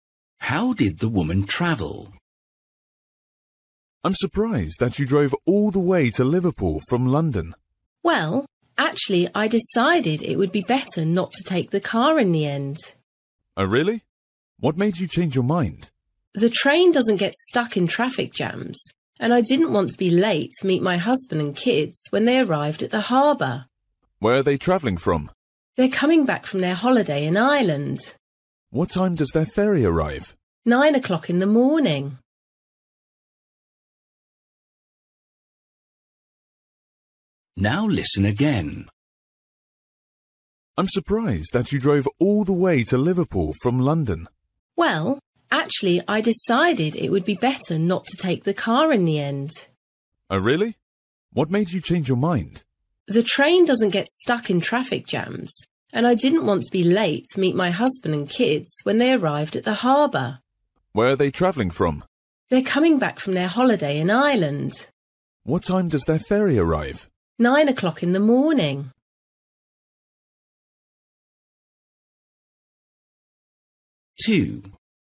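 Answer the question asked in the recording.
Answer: By train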